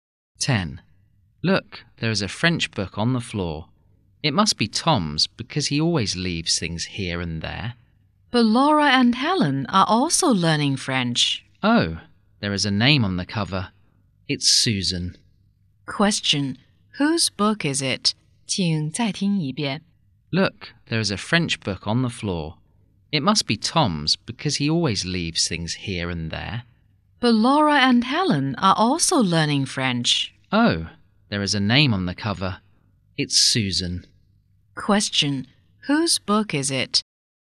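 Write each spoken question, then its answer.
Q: whose book is it?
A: Susan's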